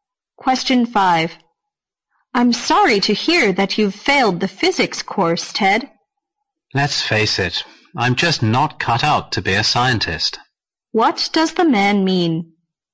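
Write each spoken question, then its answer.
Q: What does the man mean?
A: He is not suited to be a scientist.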